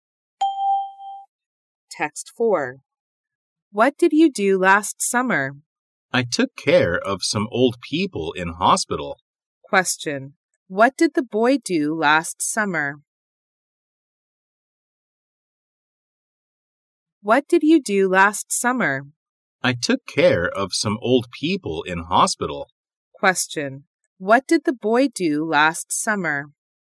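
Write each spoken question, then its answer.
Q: What did the boy do last summer?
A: He took care of some old people in hospital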